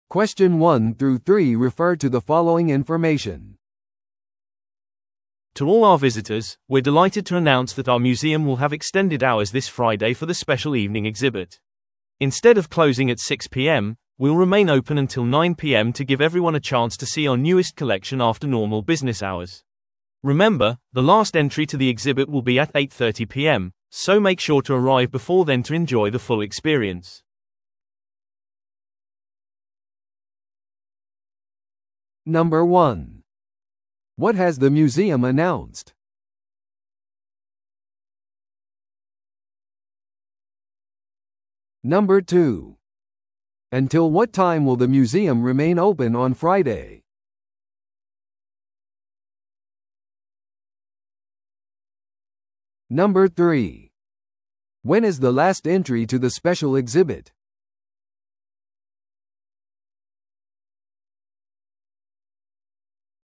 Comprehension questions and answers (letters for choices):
Listen to the audio below and answer the questions.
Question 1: What has the museum announced?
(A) 新しいコレクションの購入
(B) 新館の開館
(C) 展示のための開館時間の延長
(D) 金曜日の無料入館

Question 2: Until what time will the museum remain open on Friday?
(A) 6pm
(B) 7pm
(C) 8pm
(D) 9pm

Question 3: When is the last entry to the special exhibit?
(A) 7:30pm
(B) 8pm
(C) 8:30pm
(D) 9pm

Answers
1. C
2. D
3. C

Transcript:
To all our visitors, we're delighted to announce that our museum will have extended hours this Friday for the special evening exhibit. Instead of closing at 6pm, we'll remain open until 9pm to give everyone a chance to see our newest collection after normal business hours. Remember, the last entry to the exhibit will be at 8:30pm, so make sure to arrive before then to enjoy the full experience.